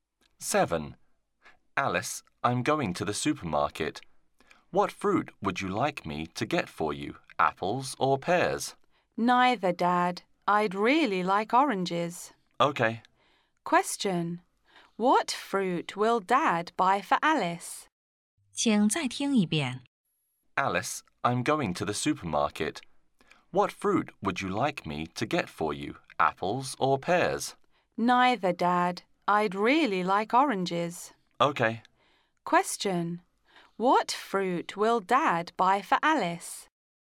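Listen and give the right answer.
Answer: Oranges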